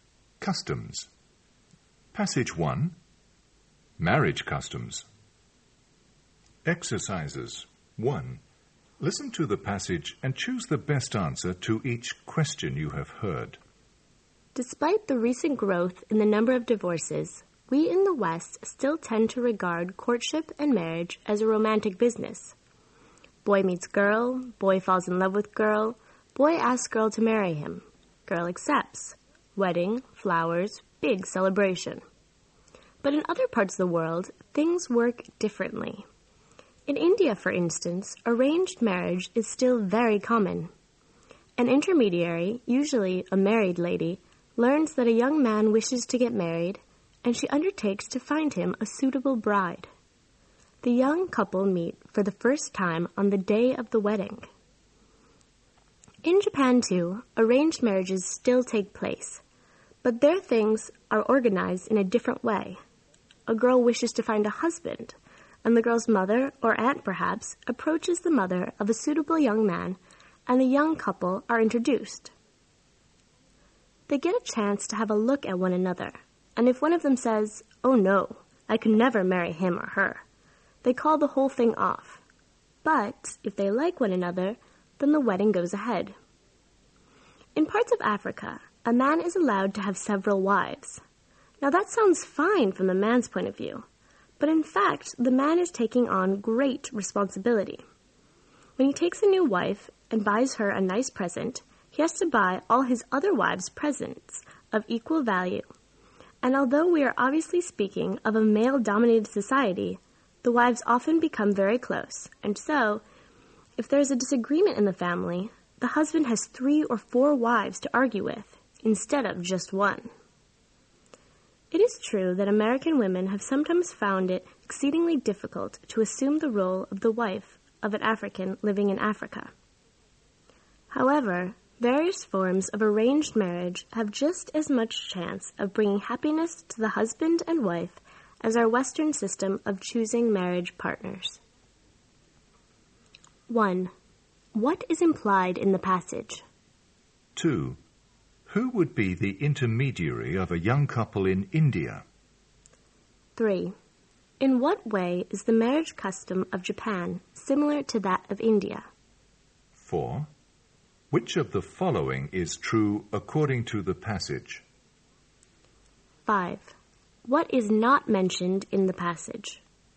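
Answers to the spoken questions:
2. Usually a married lady
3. Arranged marriages still take place in both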